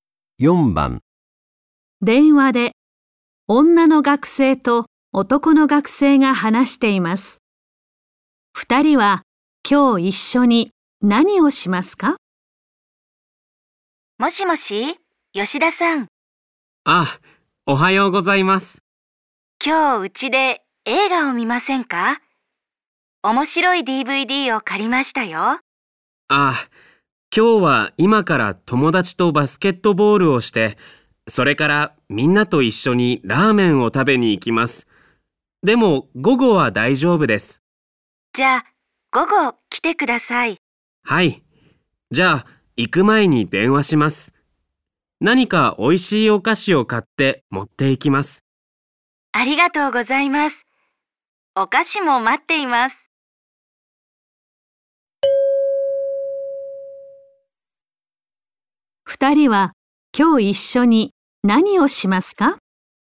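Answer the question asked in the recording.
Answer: うちで映画(DVD)を見る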